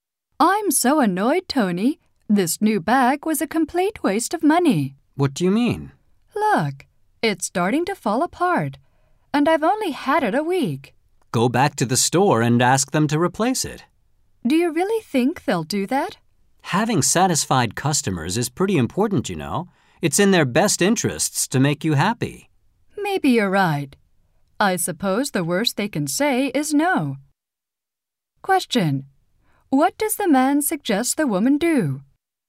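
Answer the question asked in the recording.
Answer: Go back to the store and ask them to replace the bag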